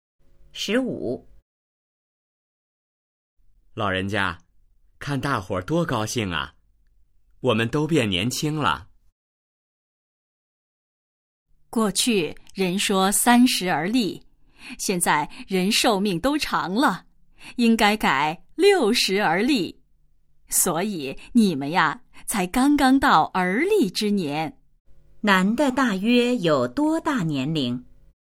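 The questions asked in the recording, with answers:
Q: 男的大约有多大年龄?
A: 大约60岁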